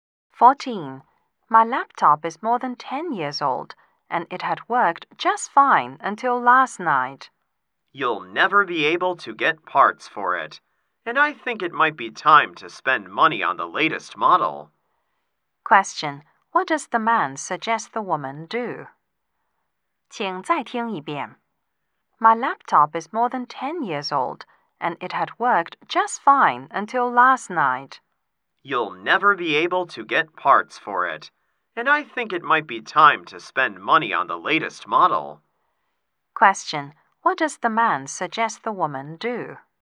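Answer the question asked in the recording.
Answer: Buy a new laptop of the latest model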